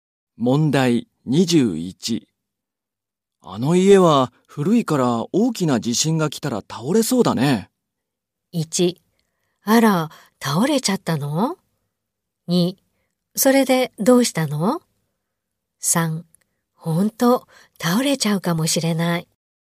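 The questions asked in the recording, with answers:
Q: あの家は古いから大きな地震が来たら倒れそうだね。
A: 3: ほんと、倒れちゃうかもしれない。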